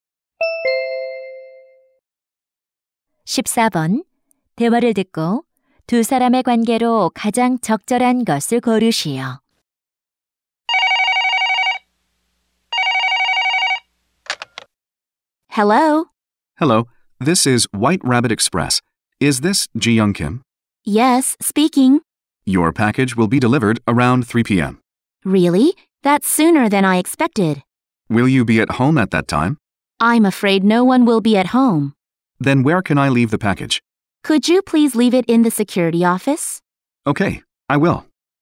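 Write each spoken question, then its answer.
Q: 대화를 듣고 두 사람의 관계로 가장 적절한 것을 고르시오.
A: 택배 기사 - 고객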